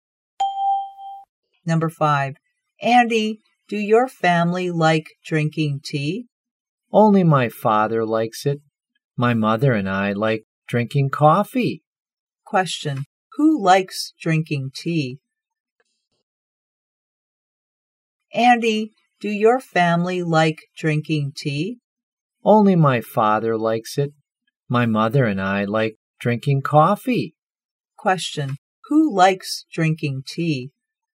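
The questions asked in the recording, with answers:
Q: Question, who likes drinking tea?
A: Andy's father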